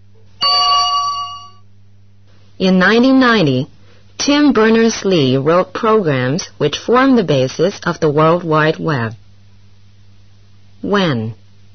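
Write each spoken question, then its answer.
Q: When?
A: In 1990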